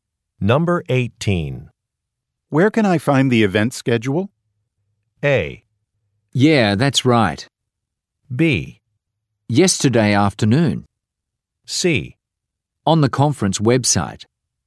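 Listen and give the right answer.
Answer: C: On the conference website.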